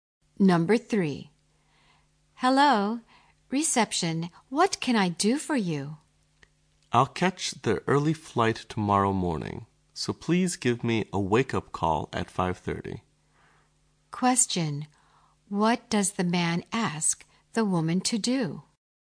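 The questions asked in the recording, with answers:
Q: What does the man ask the woman to do?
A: Give him a wake-up call at 5:30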